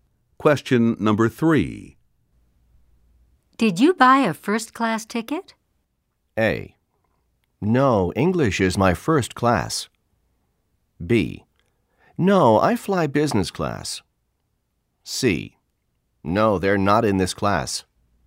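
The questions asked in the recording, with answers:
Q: Did you buy a first-class ticket?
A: B: No, I fly business class.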